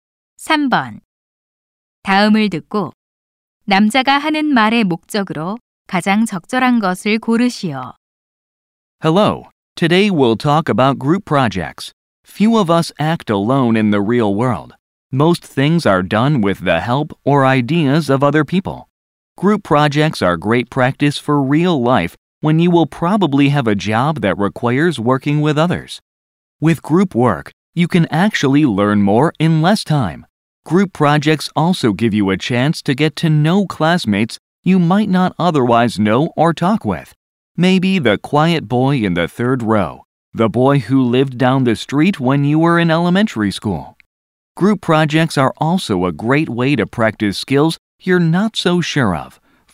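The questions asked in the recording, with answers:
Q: 다음을 듣고 남자가 하는 말의 목적으로 가장 적절한 것을 고르시오.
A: 조별 과제의 장점을 알려 주려고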